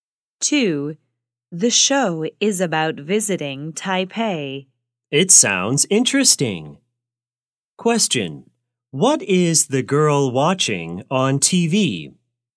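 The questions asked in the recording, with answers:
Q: What is the girl watching on TV?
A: a show about visiting Taipei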